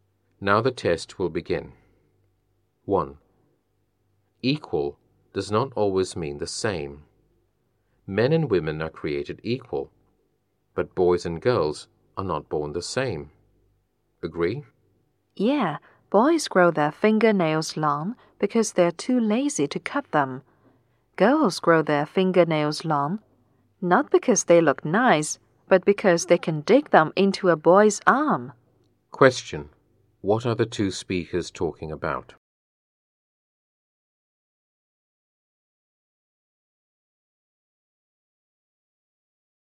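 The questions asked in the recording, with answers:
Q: What are the two speakers talking about?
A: Differences between boys and girls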